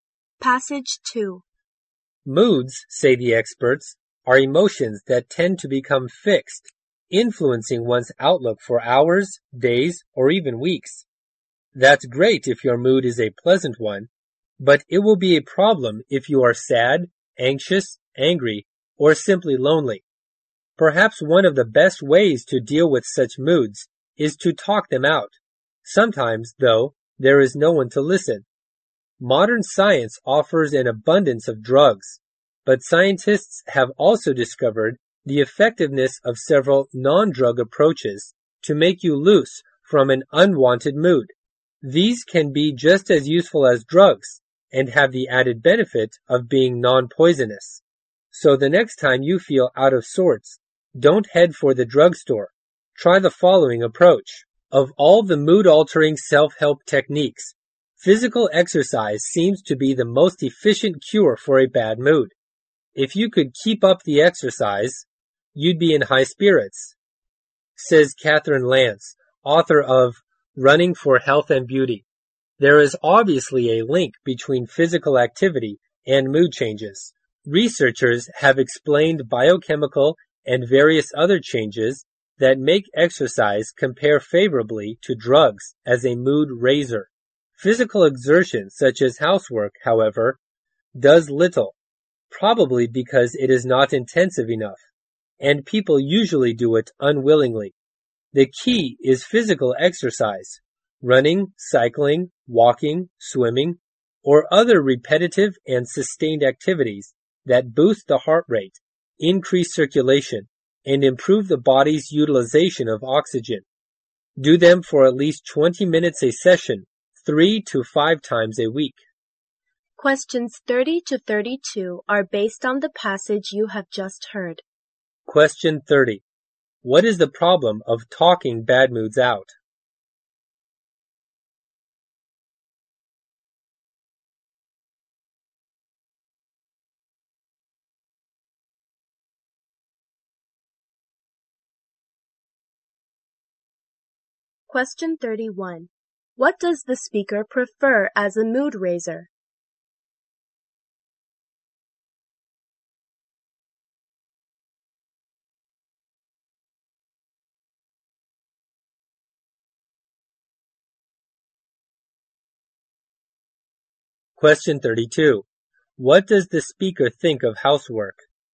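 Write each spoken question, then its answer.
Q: What is the problem of talking bad moods out?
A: Sometimes there is no one to listen

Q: What does the speaker prefer as a mood raiser?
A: Physical exercise

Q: What does the speaker think of housework?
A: It does little to improve mood because it is not intensive enough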